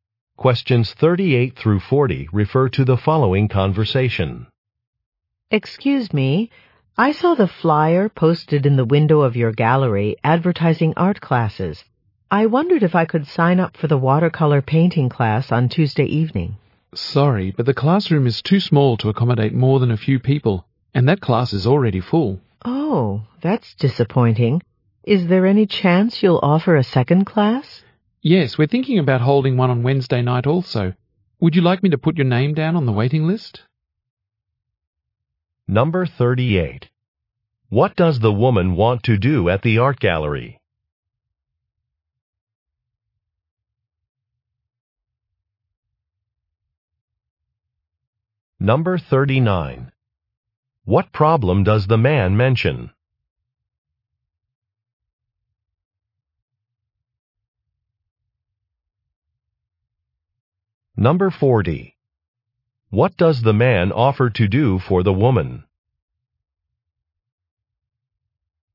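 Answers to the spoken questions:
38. Sign up for a watercolor painting class
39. The class is already full
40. Put her name on a waiting list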